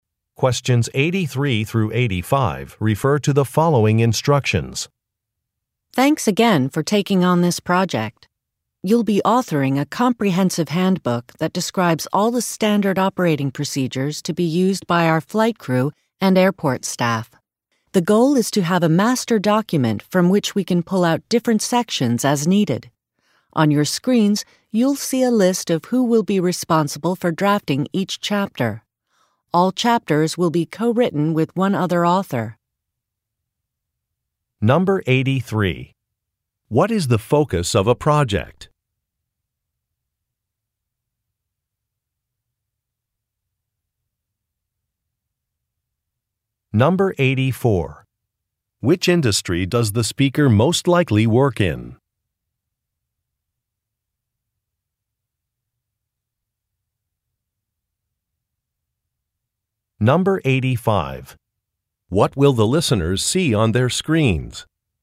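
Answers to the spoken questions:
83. Writing a handbook of standard operating procedures
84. The airline industry
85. A list of who will draft each chapter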